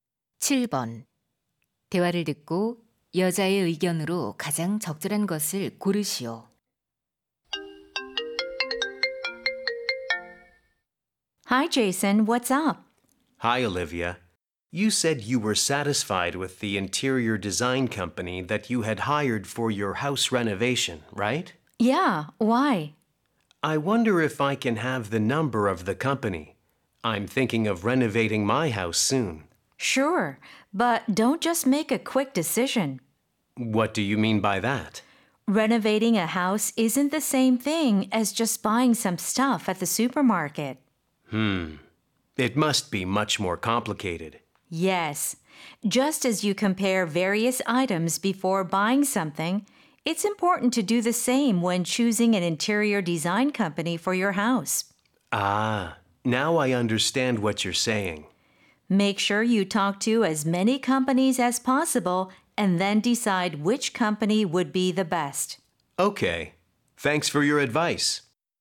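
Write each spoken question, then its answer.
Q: 대화를 듣고 여자의 의견으로 가장 적절한 것을 고르시오.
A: 인테리어 업체는 여러 곳을 비교한 뒤 선택해야 한다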